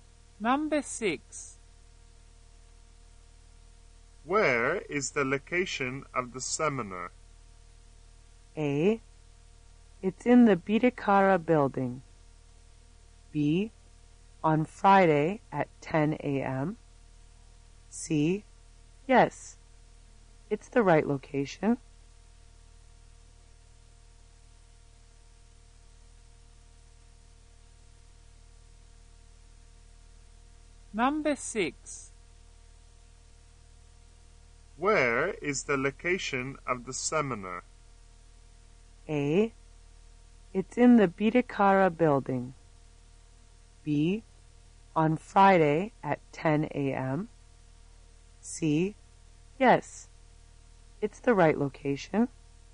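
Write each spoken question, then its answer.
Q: Where is the location of the seminar?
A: A: It's in the Bidikara building.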